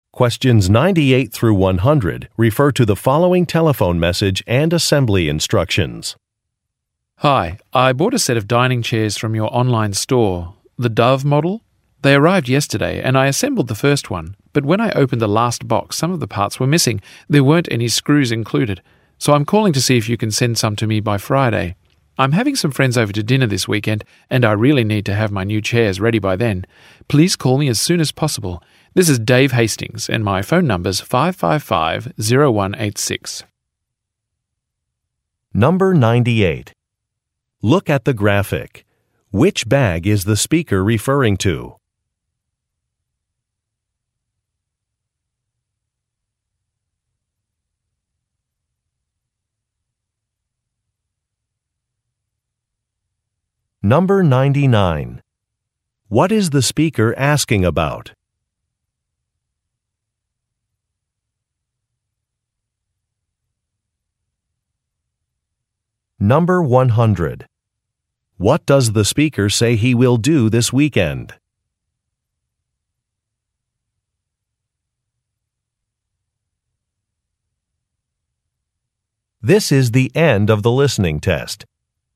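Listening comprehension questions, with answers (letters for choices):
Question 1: What is the speaker asking about?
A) A store location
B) A refund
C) Damaged goods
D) Missing parts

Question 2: What does the speaker say he will do this weekend?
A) Visit a factory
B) Travel for work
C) Host a dinner party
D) Write a review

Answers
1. D
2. C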